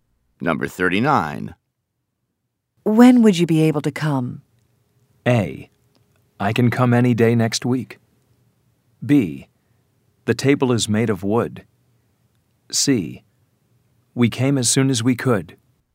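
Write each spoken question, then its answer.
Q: When would you be able to come?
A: A: I can come any day next week.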